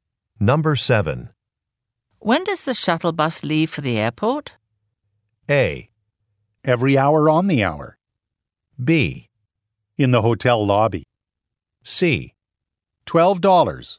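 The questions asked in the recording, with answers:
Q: When does the shuttle bus leave for the airport?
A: A: Every hour on the hour.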